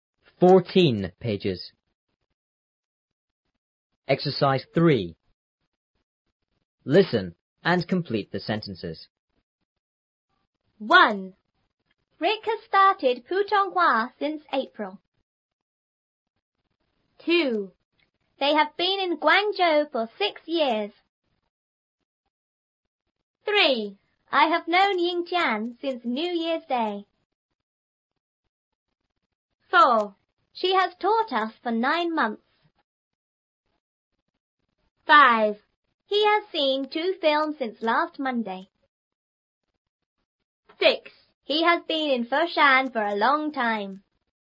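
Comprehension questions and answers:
3.Listen and complete the sentences.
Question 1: Rik has studied Putonghua___ ___.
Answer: since April

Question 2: They have been in Guangzhou___ ___ ___.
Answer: for 6 years

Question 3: I have known Yingtian___ ___ ___ ___.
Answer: since New Year's Day

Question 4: She has taught us___ ___ ___.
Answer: for 9 months

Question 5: He has seen two films___ ___ ___.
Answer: since last Monday

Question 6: He has been in Foshan___ ___ ___ ___.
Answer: for a long time

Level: 初中英语广州版3B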